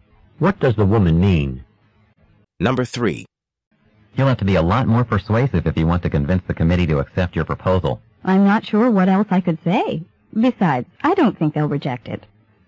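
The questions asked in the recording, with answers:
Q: What does the woman mean?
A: She thinks the committee will accept her proposal as it is.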